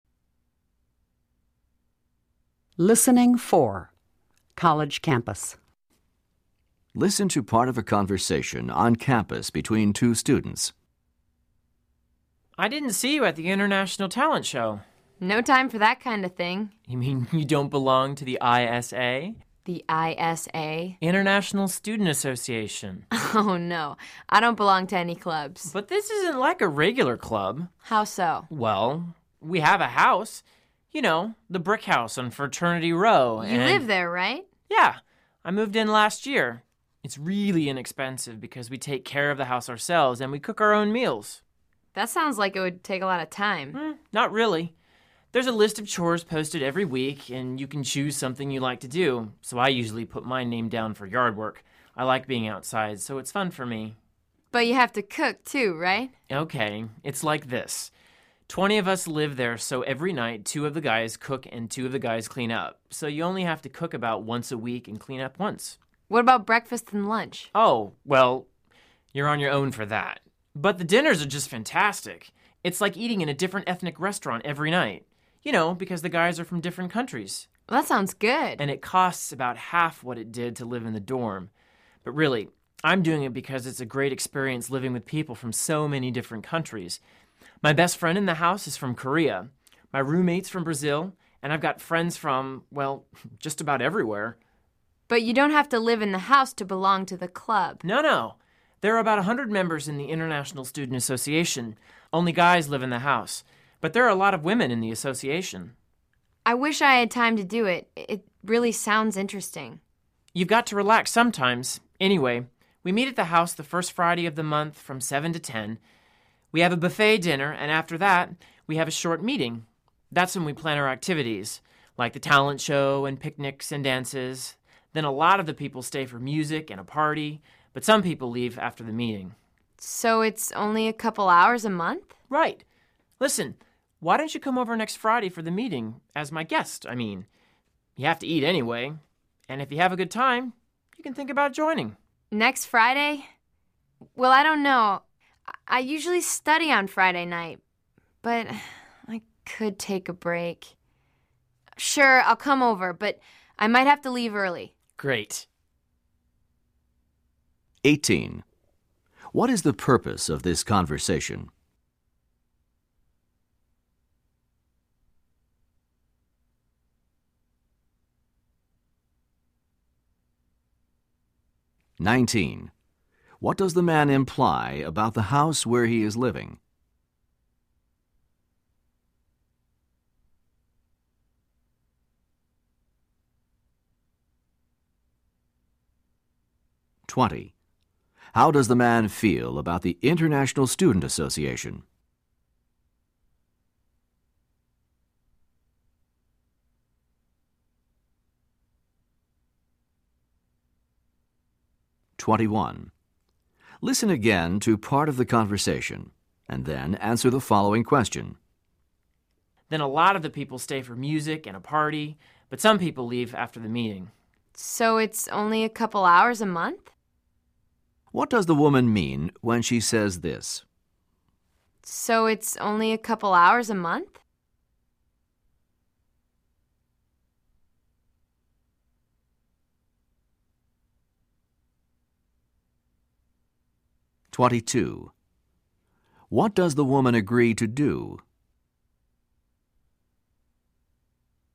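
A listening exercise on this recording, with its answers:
What is the purpose of this conversation?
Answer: The man is convincing the woman to join the International Student Association.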